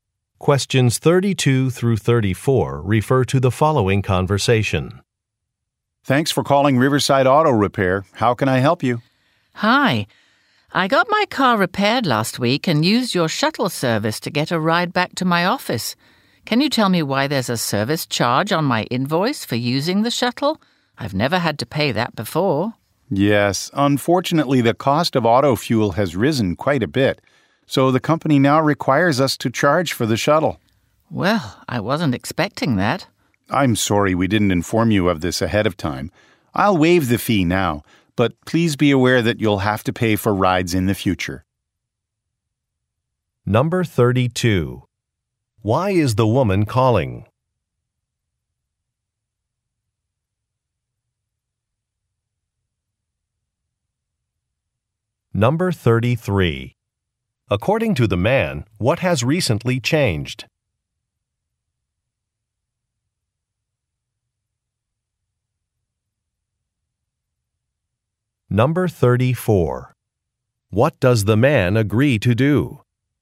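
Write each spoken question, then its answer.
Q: Why is the woman calling?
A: To ask about a shuttle service charge on her invoice

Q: According to the man, what has recently changed?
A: Fuel costs have risen, so the shuttle now costs money

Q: What does the man agree to do?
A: Waive the fee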